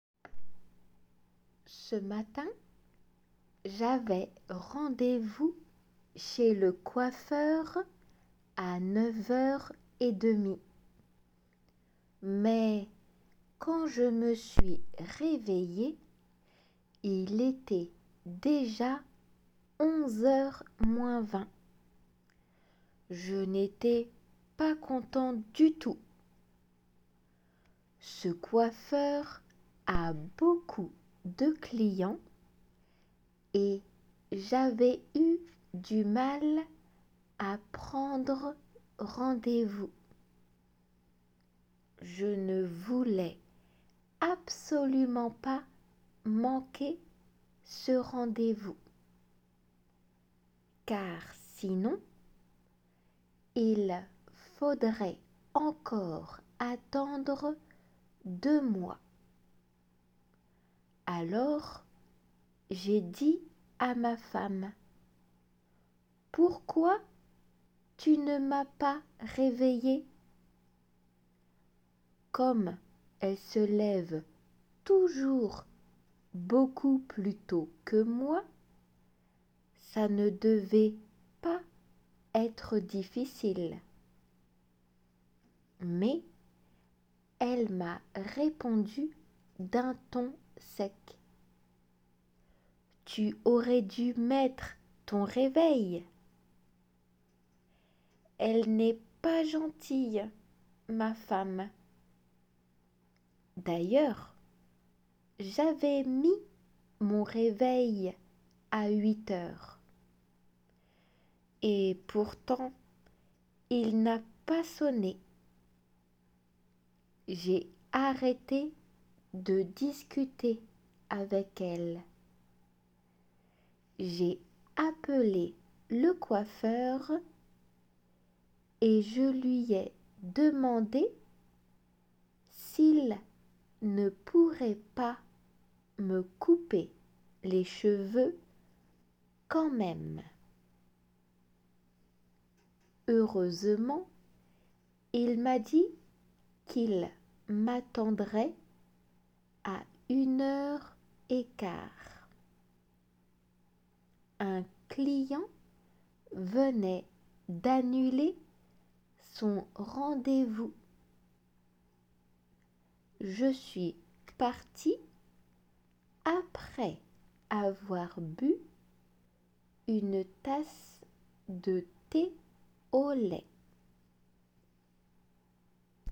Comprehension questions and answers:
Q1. Quand Alain s'est réveillé, il n'était pas heureux.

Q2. Il n'est pas facile de prendre rendez-vous chez le coiffeur d'Alain.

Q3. Alain a pensé que sa femme était méchante.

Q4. Alain avait mis son réveil bien à l'heure.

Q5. Au lieu de continuer à discuter avec sa femme, Alain a téléphoné au coiffeur.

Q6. Le coiffeur a dit à Alain qu'il pourrait le recevoir à 13 heures 15.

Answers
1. 〇
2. 〇
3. 〇
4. 〇
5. 〇
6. 〇

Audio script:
Ce matin, j'avais rendez-vous chez le coiffeur à neuf heures et demie. Mais quand je me suis réveillé, il était déjà 11 heures moins 20.
Je n'étais pas content du tout ! Ce coiffeur a beaucoup de clients et j'avais eu du mal à prendre rendez-vous.
Je ne voulais absolument pas manquer ce rendez-vous. Car sinon, il faudrait encore attendre deux mois.
Alors j'ai dit à ma femme : "Pourquoi tu ne m'as pas réveillé ?" Comme elle se lève toujours beaucoup plus tôt que moi, ça ne devait pas être difficile.
Mais elle m'a répondu d'un ton sec : "Tu aurais dû mettre ton réveil." Elle n'est pas gentille, ma femme ! D'ailleurs, j'avais mis mon réveil à huit heures.
Et pourtant il n'a pas sonné. J'ai arrêté de discuter avec elle. J'ai appelé le coiffeur, et je lui ai demandé s'il ne pourrait pas me couper les cheveux quand même.
Heureusement il m'a dit qu'il m'attendrait à une heure et quart. Un client venait d'annuler son rendez-vous. Je suis parti après avoir bu une tasse de thé au lait.